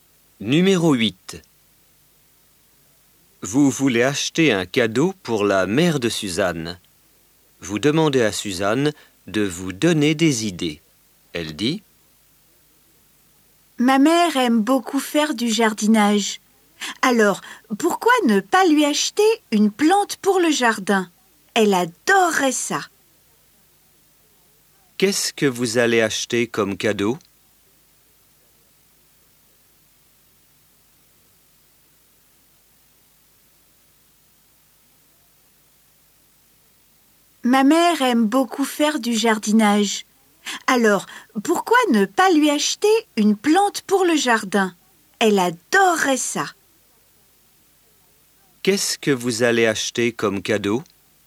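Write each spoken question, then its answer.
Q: Qu'est-ce que vous allez acheter comme cadeau?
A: Une plante pour le jardin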